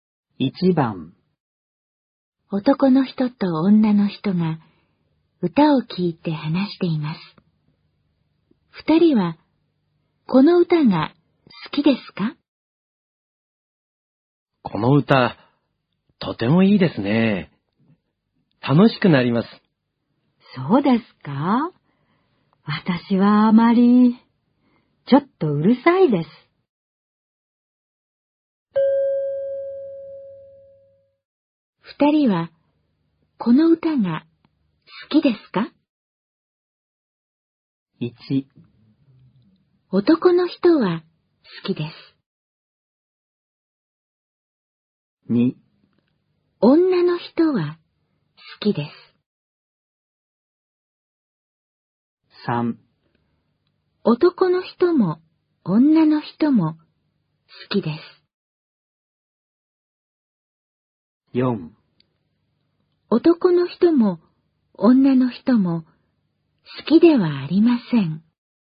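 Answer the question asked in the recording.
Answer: 1: 男の人は好きです。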